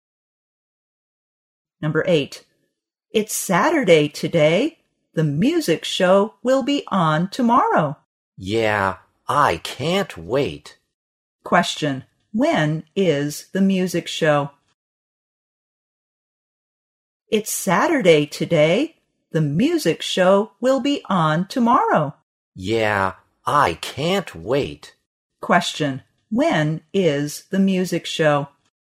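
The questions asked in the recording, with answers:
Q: when is the music show?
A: Sunday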